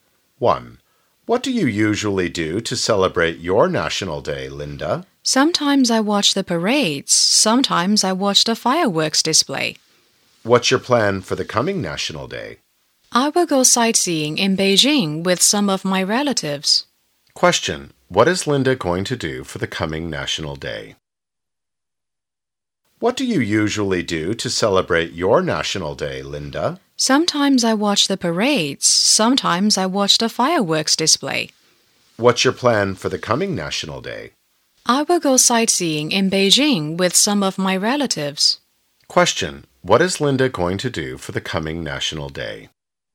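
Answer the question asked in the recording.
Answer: Go sightseeing in Beijing with some of her relatives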